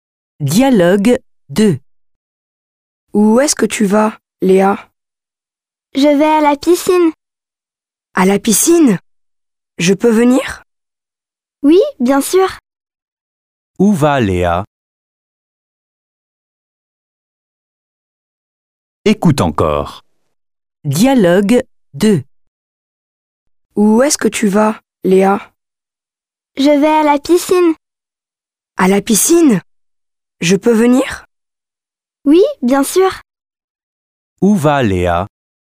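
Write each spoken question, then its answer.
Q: Où va Léa?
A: À la piscine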